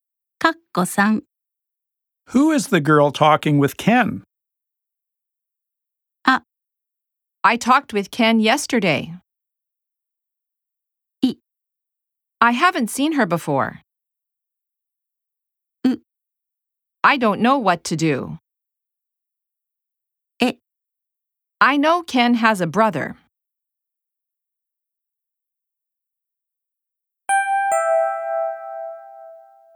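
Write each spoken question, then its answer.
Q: Who is the girl talking with Ken?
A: い: I haven't seen her before.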